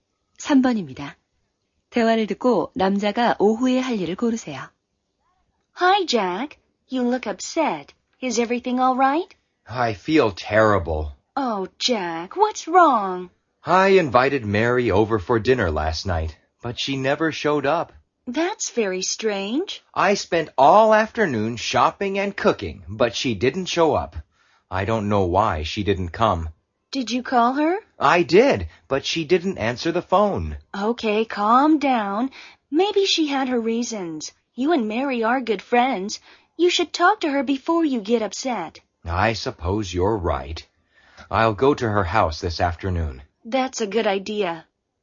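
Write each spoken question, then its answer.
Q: 대화를 듣고 남자가 오후에 할 일을 고르세요.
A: Mary의 집에 가기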